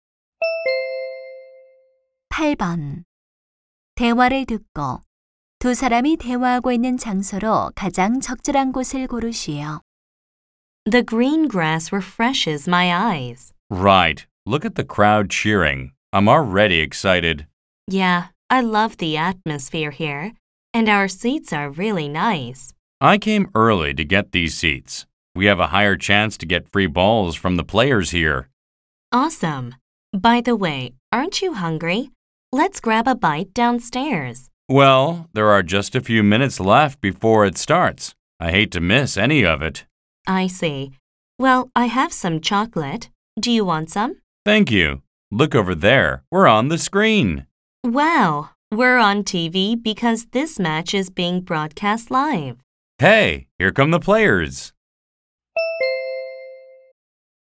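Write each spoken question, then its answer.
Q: 대화를 듣고 두 사람이 대화하고 있는 장소로 가장 적절한 곳을 고르시오.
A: 야구장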